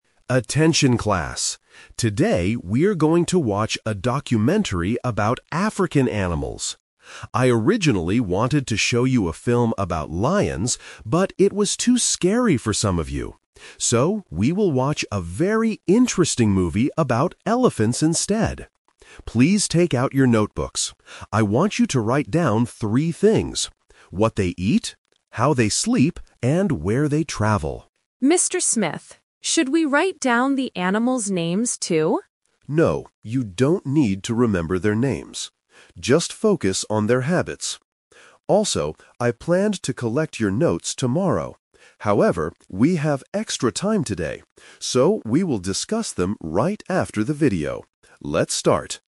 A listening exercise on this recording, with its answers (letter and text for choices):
Listen to the teacher's instructions and choose the correct answer (A, B, or C) for each question.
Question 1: What animal is the documentary about?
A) Lions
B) Elephants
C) Monkeys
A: B) Elephants

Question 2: What should the students write in their notebooks?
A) The animals' names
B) The animals' habits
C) The animals' ages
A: B) The animals' habits

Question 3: When will the class discuss the notes?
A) After the video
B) Tomorrow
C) Next week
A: A) After the video

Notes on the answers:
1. The teacher says he originally wanted to show a film about lions (Option A is the trap), "but" it was too scary. So, they will watch a movie about elephants instead. Option C is not mentioned.
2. The student asks if they should write down the names (Option A is the trap). The teacher says "No" and tells them to "just focus on their habits" (what they eat, how they sleep, etc.). Option C is not mentioned.
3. The teacher planned to collect the notes "tomorrow" (Option B is the trap). "However," he changes his mind because they have extra time, so they will discuss the notes "right after the video." Option C is not mentioned.

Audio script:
Teacher: Attention class. Today we are going to watch a documentary about African animals. I originally wanted to show you a film about lions, but it was too scary for some of you. So, we will watch a very interesting movie about elephants instead. Please take out your notebooks. I want you to write down three things: what they eat, how they sleep, and where they travel.
Student: Mr. Smith, should we write down the animals' names, too?
Teacher: No, you don't need to remember their names. Just focus on their habits. Also, I planned to collect your notes tomorrow. However, we have extra time today. So, we will discuss them right after the video. Let's start!